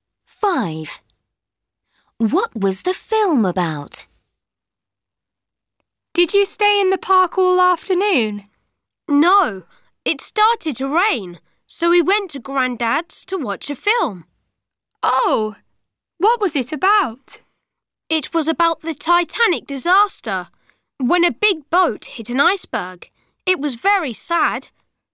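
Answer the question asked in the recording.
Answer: The Titanic disaster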